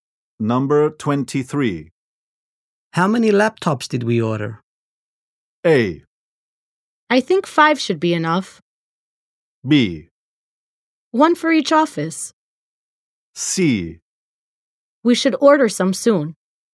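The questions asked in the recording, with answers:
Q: How many laptops did we order?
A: B: 1 for each office.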